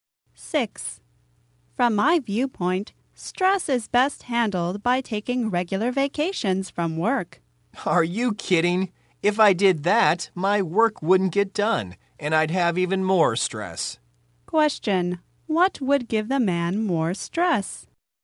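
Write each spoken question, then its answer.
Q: What would give the man more stress?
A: Taking regular vacations, because his work wouldn't get done.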